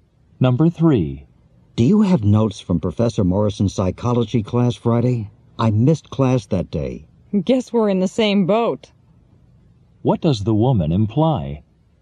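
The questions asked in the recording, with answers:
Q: What does the woman imply?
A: She also missed the class and has no notes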